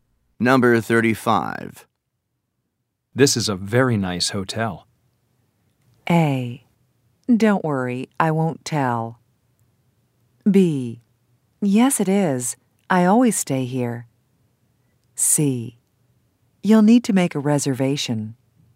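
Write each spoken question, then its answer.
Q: This is a very nice hotel.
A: B: Yes, it is. I always stay here.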